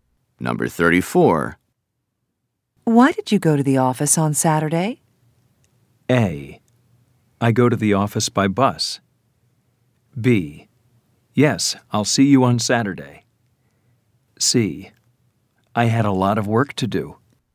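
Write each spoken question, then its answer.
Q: Why did you go to the office on Saturday?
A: C: I had a lot of work to do.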